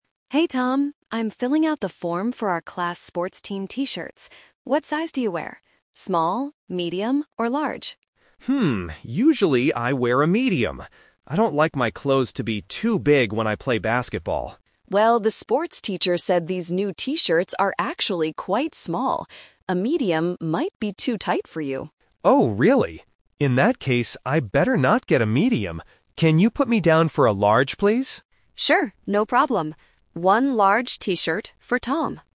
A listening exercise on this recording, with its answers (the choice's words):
Listen to the conversation between the class monitor and a student. Choose the correct answer (A, B, or C).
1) What are Chloe and Tom talking about?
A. Buying new basketballs.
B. Ordering team T-shirts.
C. Paying the sports teacher.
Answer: Ordering team T-shirts.

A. Small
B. Medium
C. Large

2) What T-shirt size does Tom usually wear?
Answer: Medium

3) Which T-shirt size does Tom decide to order at the end?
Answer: Large

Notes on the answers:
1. Chloe says, "I'm filling out the form for our class sports team T-shirts." Option (A) is a trap; Tom mentions playing "basketball," but they are not buying basketballs. Option (C) is plausible in a school context but is not mentioned in the audio.
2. Tom clearly states, "usually I wear a Medium." Option (C) is a trap; Large is the size he chooses later, not the size he usually wears. Option (A) is mentioned by Chloe ("these new T-shirts are actually quite small") but is not Tom's size.
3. This question uses the "Twist" technique. Tom originally wants a Medium but changes his mind because the shirts are small. He finally says, "Can you put me down for a Large, please?" Option (B) is the trap (the rejected option). Option (A) is not the size he chose.

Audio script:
Chloe: Hey Tom, I'm filling out the form for our class sports team T-shirts. What size do you wear? Small, Medium, or Large?
Tom: Hmm, usually I wear a Medium. I don't like my clothes to be too big when I play basketball.
Chloe: Well, the sports teacher said these new T-shirts are actually quite small. A Medium might be too tight for you.
Tom: Oh, really? In that case, I better not get a Medium. Can you put me down for a Large, please?